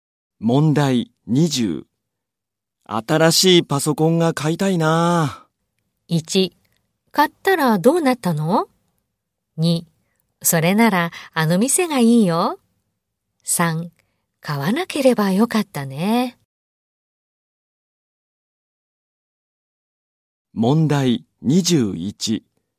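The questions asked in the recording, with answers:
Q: 新しいパソコンが買いたいな。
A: 2: それならあの店がいいよ。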